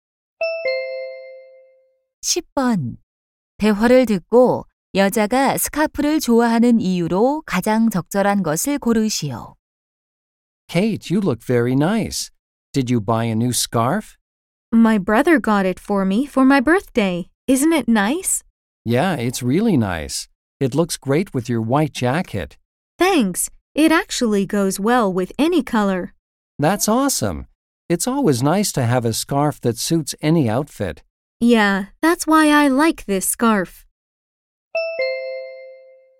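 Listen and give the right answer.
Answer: 어떤 색과도 잘 어울려서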